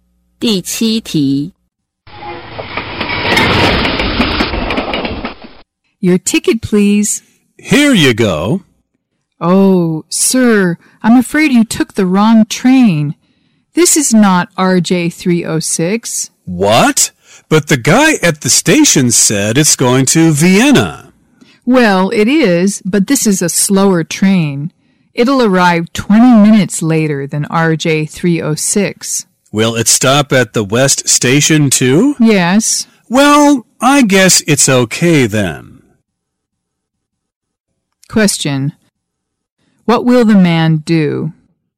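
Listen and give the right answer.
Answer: Stay on the slower train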